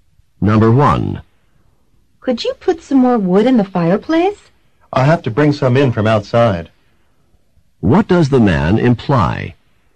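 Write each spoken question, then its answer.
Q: What does the man imply?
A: There is no more wood inside.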